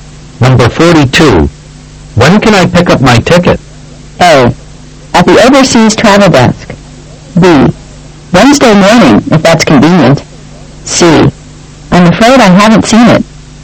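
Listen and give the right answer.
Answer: B: Wednesday morning, if that's convenient.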